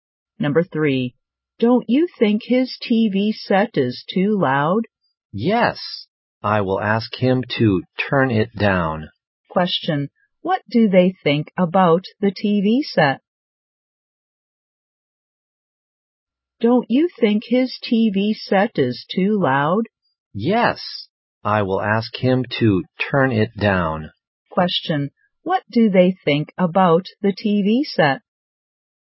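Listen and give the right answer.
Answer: It is too loud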